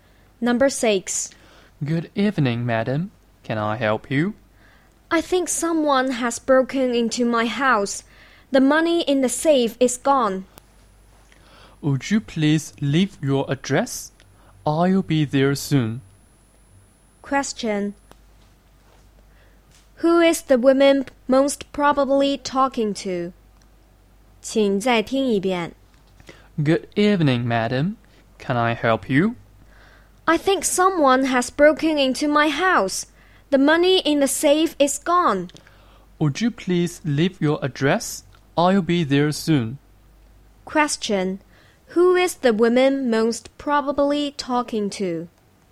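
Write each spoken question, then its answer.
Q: Who is the woman most probably talking to?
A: A policeman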